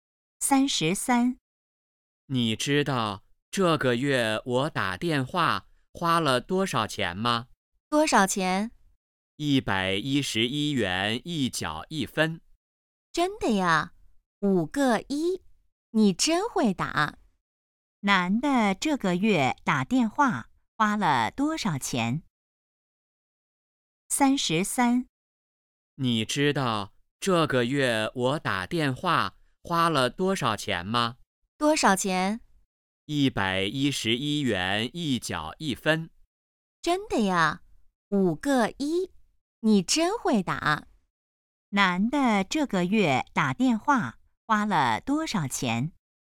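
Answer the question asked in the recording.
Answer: 111.11元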